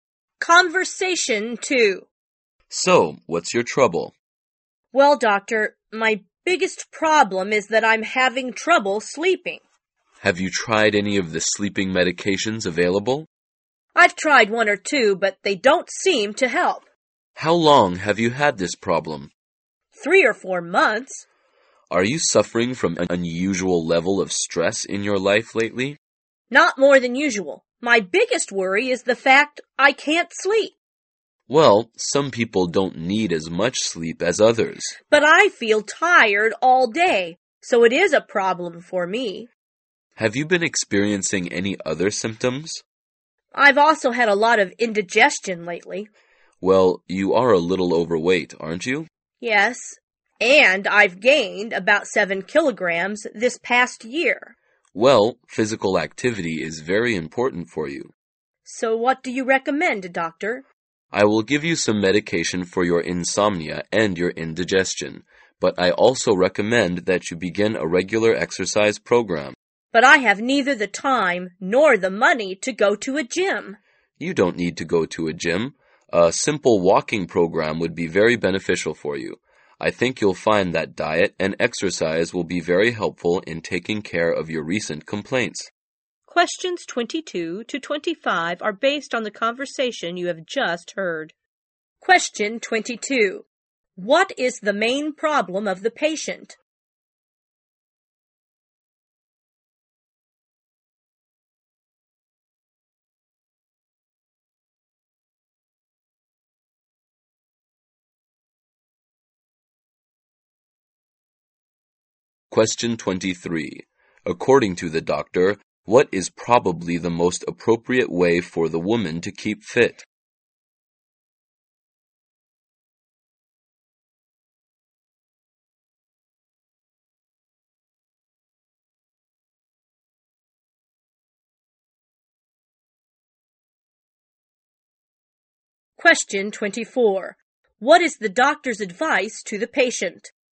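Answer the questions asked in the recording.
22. She has trouble sleeping
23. A simple walking program
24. Take medication and begin a regular exercise program with diet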